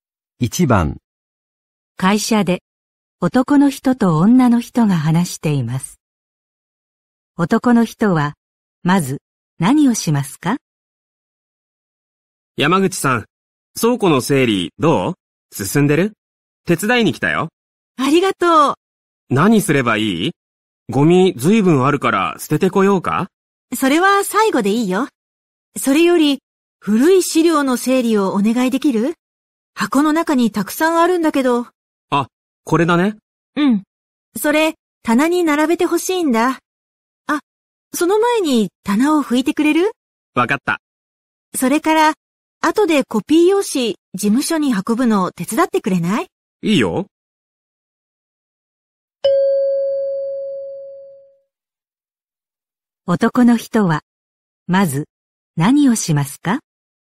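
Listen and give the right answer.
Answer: 棚を拭く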